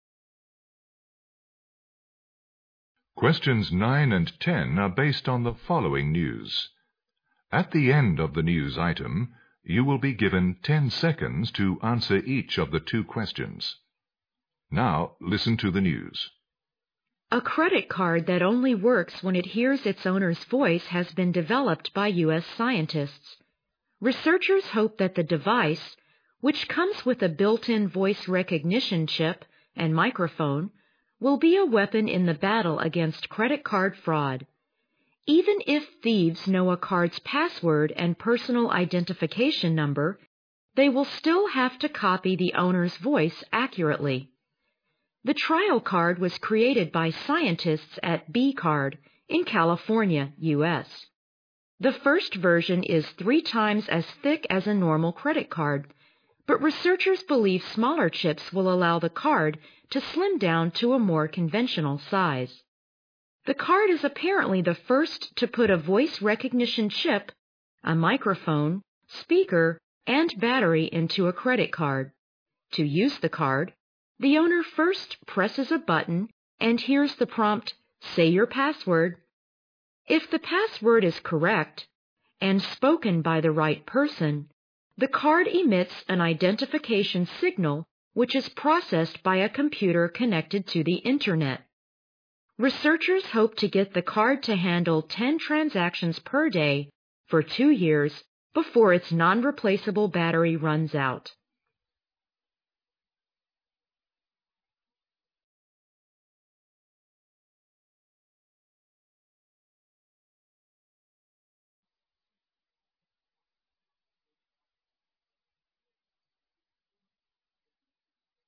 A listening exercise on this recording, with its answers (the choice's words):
Questions 9 and 10 are based onthe following news. At the end of the news item, you will be given 10 secondsto answer each of the two questions.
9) According to thenews, what makes this credit card different from conventional ones is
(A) that it can hear the owner'svoice.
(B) that it can remember apassword.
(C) that it can identify theowner's voice.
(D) that it can remember theowner's PIN.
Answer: that it can identify theowner's voice.

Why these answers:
细节题。材料介绍说,信用卡的新型之处在于"only works when it hears itsowner's voice...with a built-in voice recognition chip",可见,这种卡能识别主人的声音。

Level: GRADE EIGHT